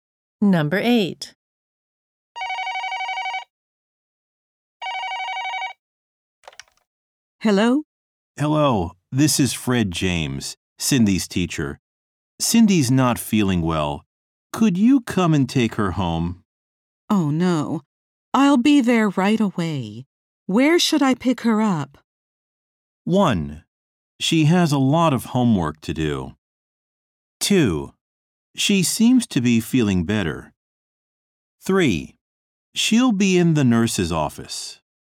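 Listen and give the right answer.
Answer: 3: She'll be in the nurse's office.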